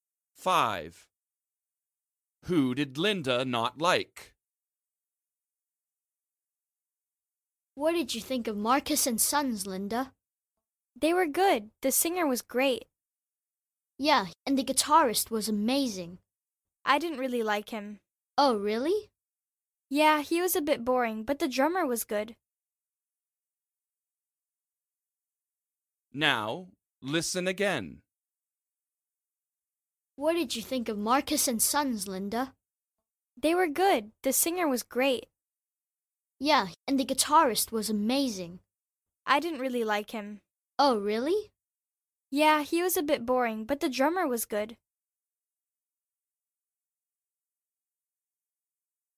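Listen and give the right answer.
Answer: the guitarist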